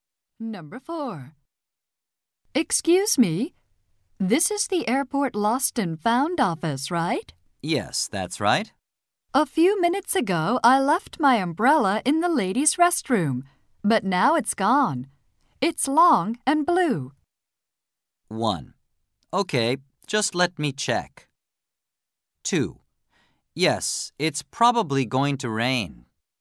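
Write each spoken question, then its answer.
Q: It's long and blue.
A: 1: Okay, just let me check.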